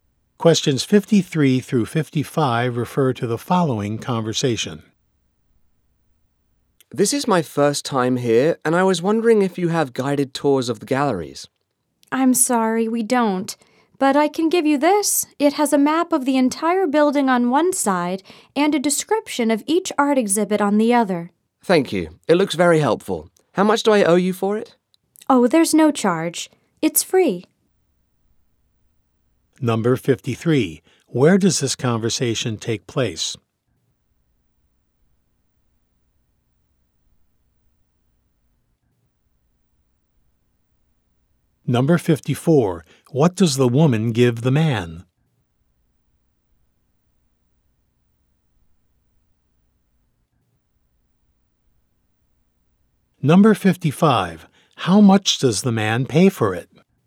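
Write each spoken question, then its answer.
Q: Where does this conversation take place?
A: At an art museum

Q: What does the woman give the man?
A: A map and exhibit guide

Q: How much does the man pay for it?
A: Nothing; it's free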